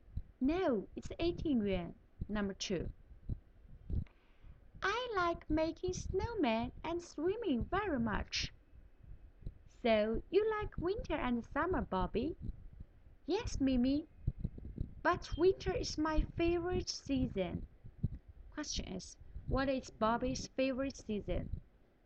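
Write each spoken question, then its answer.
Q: what is Bobby's favorite season?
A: winter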